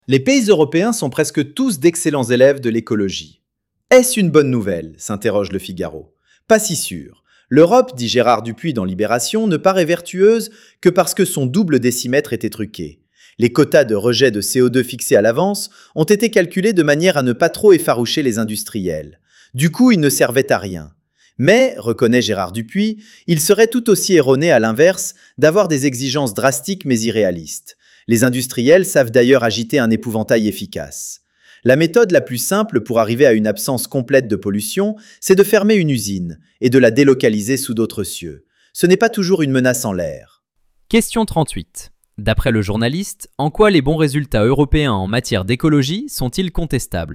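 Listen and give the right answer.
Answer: Les quotas de CO2 ont été fixés trop bas pour ne pas effaroucher les industriels.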